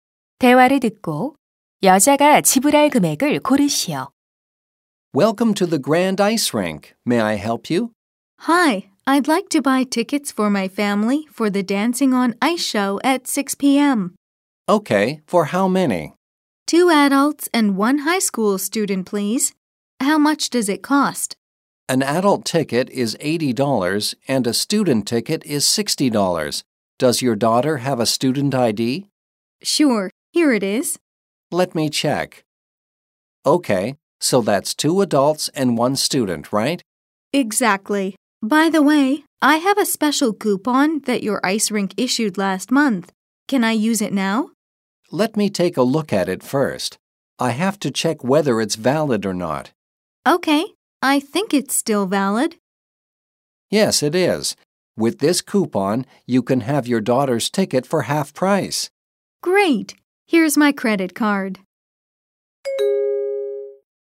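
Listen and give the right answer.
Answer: 190달러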